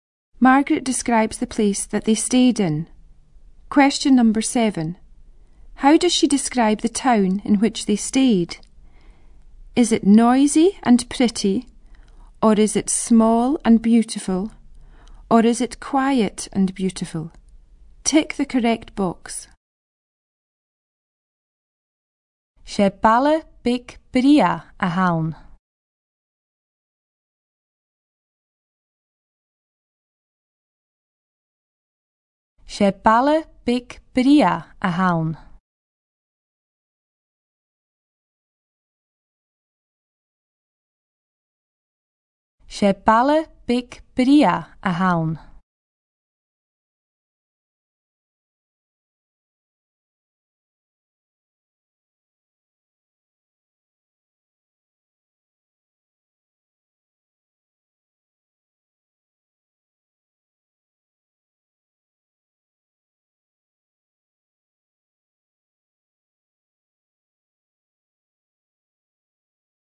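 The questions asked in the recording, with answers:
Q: How does she describe the town in which they stayed?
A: Small and beautiful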